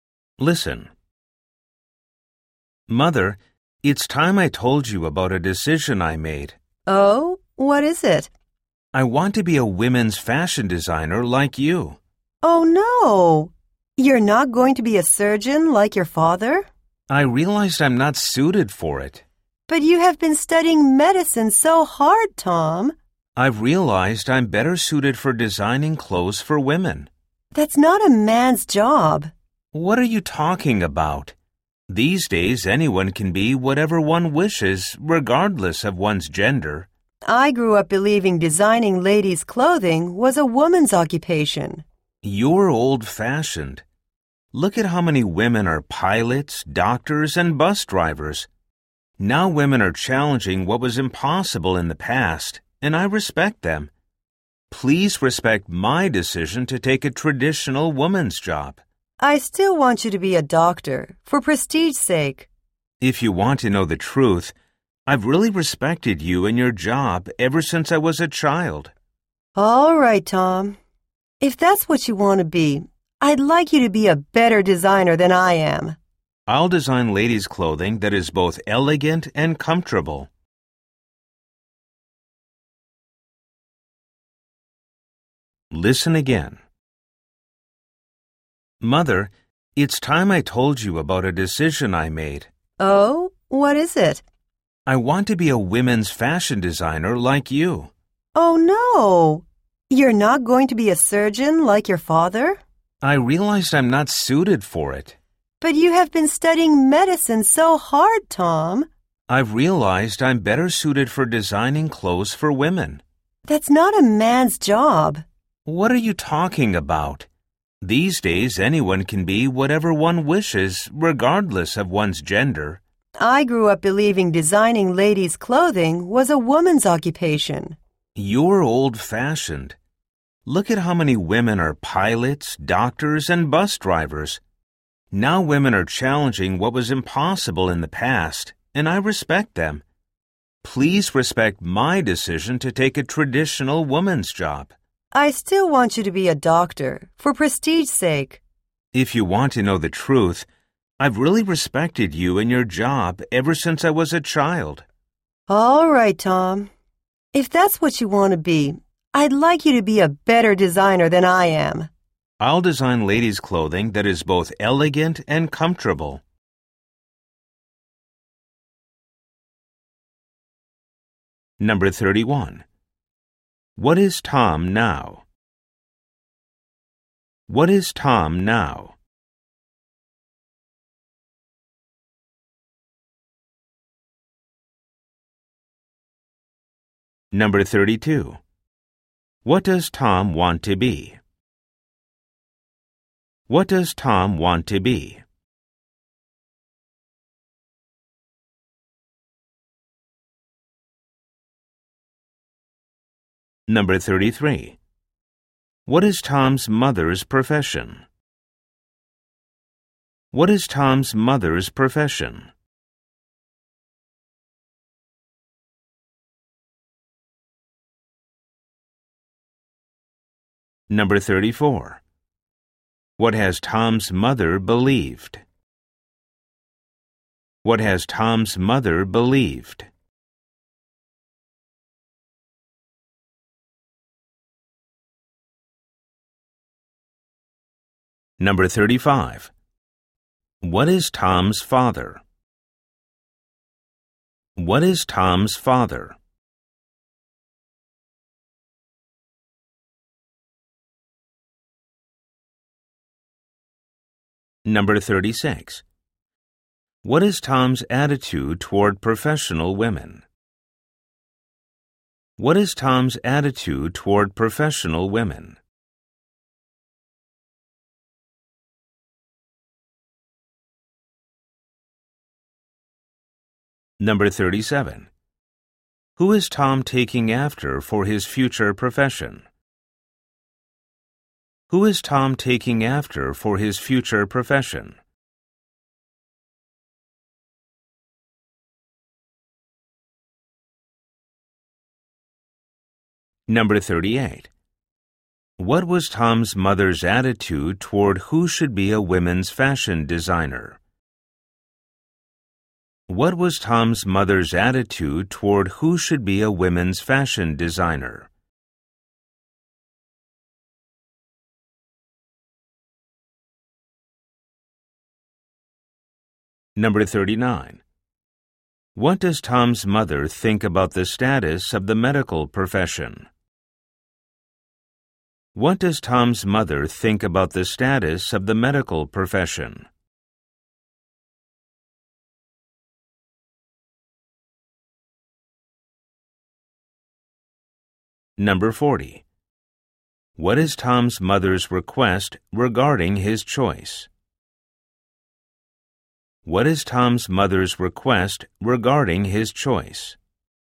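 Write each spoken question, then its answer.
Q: What is Tom now?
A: A medical student

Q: What does Tom want to be?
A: A women's fashion designer

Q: What is Tom's mother's profession?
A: A women's fashion designer

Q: What has Tom's mother believed?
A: That designing ladies' clothing is a woman's job

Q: What is Tom's father?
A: A surgeon

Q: What is Tom's attitude toward professional women?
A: He respects them

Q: Who is Tom taking after for his future profession?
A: His mother

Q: What was Tom's mother's attitude toward who should be a women's fashion designer?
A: She thought it should be a woman, which is old-fashioned

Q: What does Tom's mother think about the status of the medical profession?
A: She thinks it is prestigious

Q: What is Tom's mother's request regarding his choice?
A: That he become a better designer than she is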